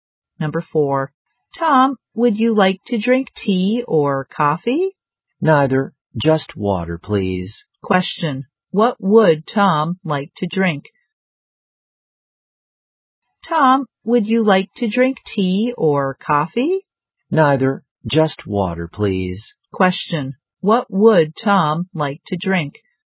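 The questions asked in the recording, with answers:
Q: what would Tom like to drink?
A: Water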